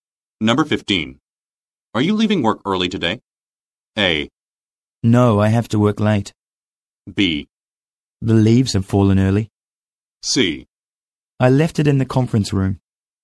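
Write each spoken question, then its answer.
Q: Are you leaving work early today?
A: A: No, I have to work late.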